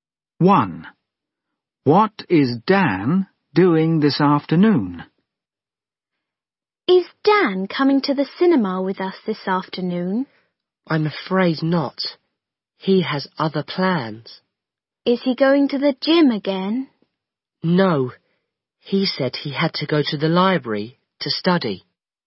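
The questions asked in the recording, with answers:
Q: What is Dan doing this afternoon?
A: going to the library to study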